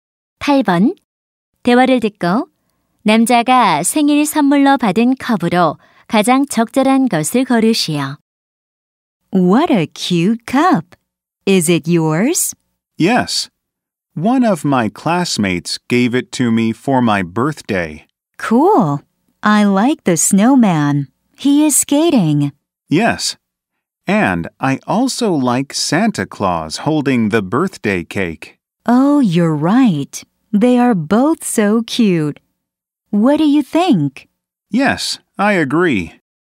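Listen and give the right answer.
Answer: 스케이트 타는 눈사람과 생일 케이크를 든 산타클로스가 그려진 컵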